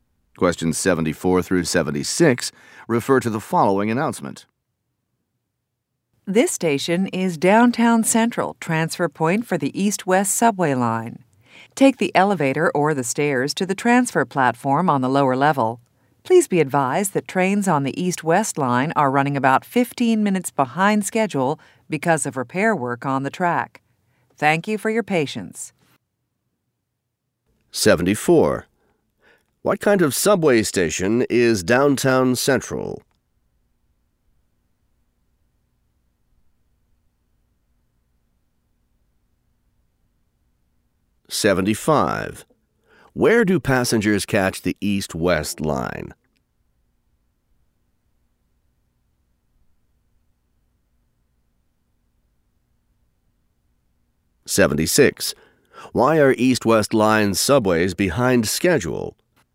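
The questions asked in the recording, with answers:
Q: What kind of subway station is Downtown Central?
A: A transfer point for the East-West line

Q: Where do passengers catch the East-West line?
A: On the lower-level transfer platform

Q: Why are East-West line subways behind schedule?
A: Because of repair work on the track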